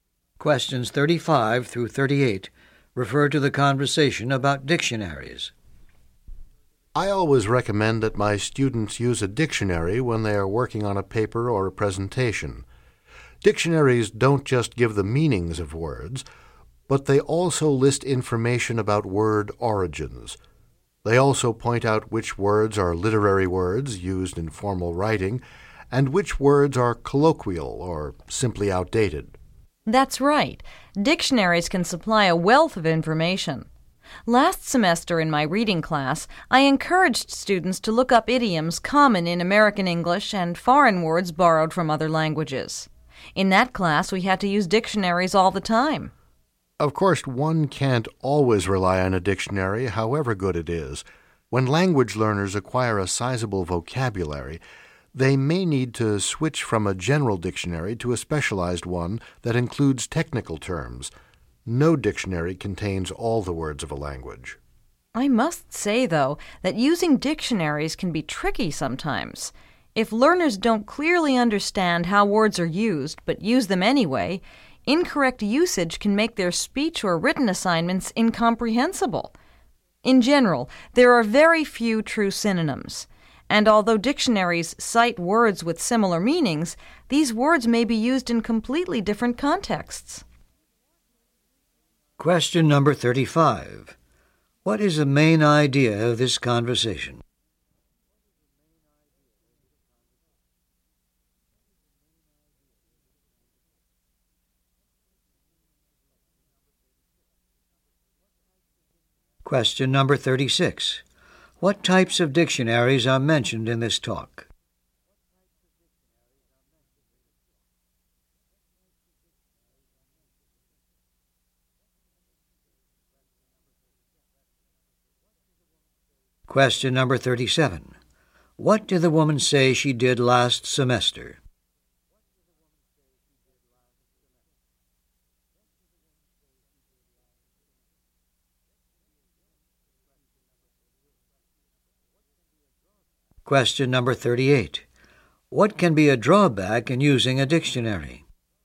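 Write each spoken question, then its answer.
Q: What is the main idea of this conversation?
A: The uses and limitations of dictionaries

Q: What types of dictionaries are mentioned in this talk?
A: General and specialized dictionaries

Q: What can be a drawback in using a dictionary?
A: Words with similar meanings may be used in different contexts, so learners may use them incorrectly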